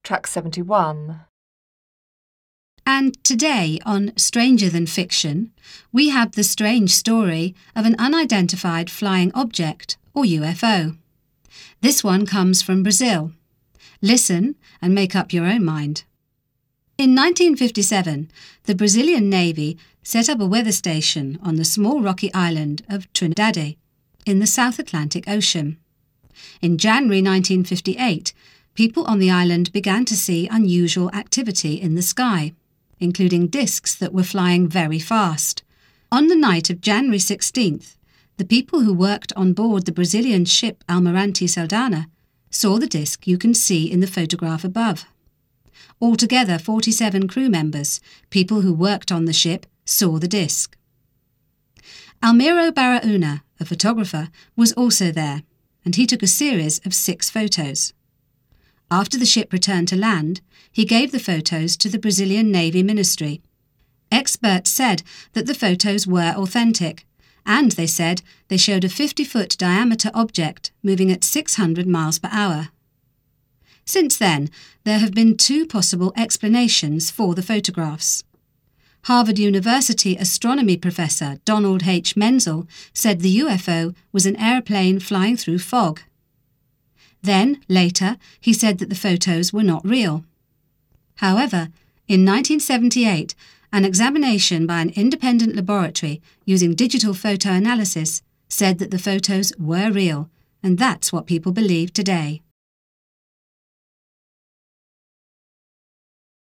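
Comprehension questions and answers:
You have 30 seconds to read the task. Then listen to the radio programme and tick off the correct answer.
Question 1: The UFO comes from Brazil.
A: true

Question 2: In 1958 the disc was seen by a great number of people.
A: true

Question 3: The Navy hired a photographer to take a picture of the UFO.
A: false

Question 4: Experts identified the photos to be unreal.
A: false

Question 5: The UFO was going very fast.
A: true

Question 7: Many people think that the photos are real.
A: true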